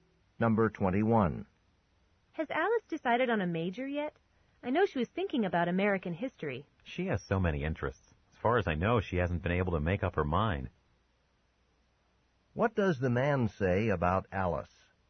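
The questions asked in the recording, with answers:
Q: What does the man say about Alice?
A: She hasn't chosen a major yet.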